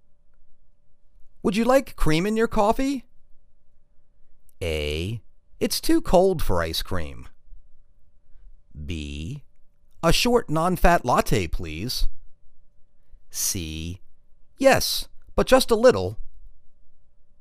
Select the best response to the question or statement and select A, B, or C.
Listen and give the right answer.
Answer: Yes, but just a little.